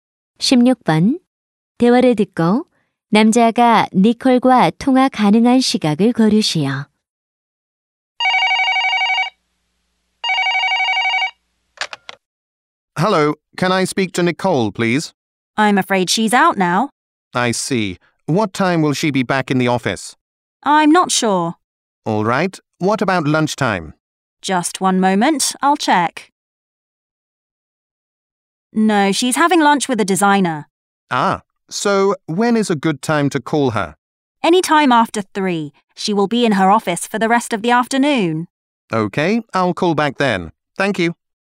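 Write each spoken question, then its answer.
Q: 대화를 듣고 남자가 니콜과 통화 가능한 시각을 고르시오.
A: 3시 이후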